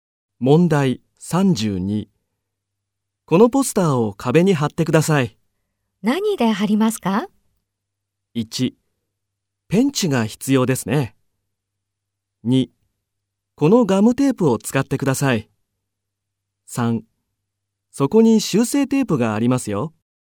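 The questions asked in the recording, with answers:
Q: このポスターを壁に貼ってください。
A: 2: このガムテープを使ってください。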